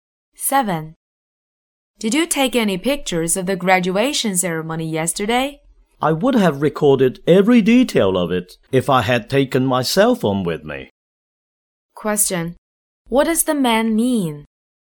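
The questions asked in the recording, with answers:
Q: What does the man mean?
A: He didn't take any pictures because he didn't have his phone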